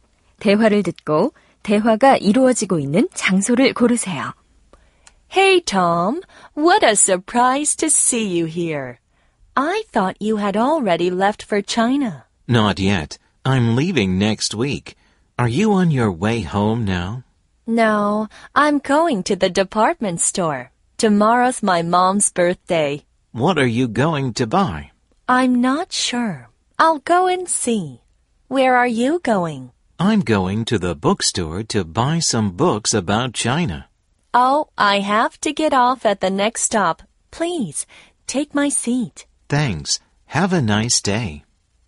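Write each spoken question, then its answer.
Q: 대화를 듣고 대화가 이루어지고 있는 장소를 고르세요.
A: 버스 안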